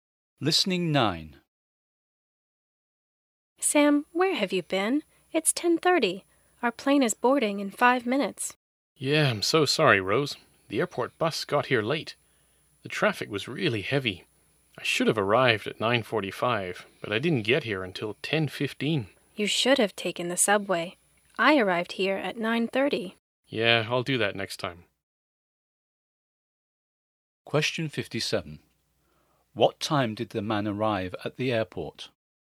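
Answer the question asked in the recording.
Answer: 10:15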